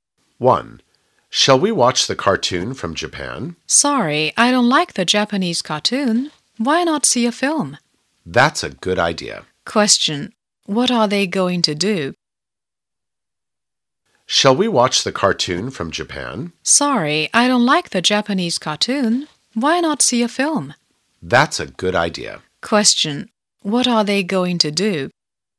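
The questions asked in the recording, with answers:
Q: What are they going to do?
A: See a film.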